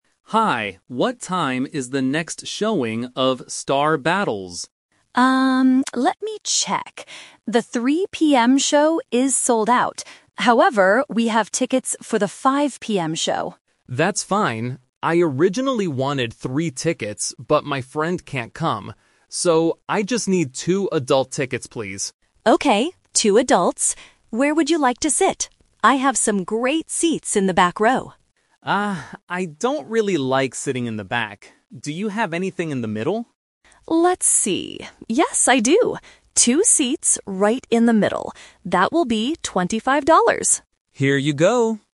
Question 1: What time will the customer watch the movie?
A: 5:00 PM

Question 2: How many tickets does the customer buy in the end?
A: Two

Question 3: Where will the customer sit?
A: In the middle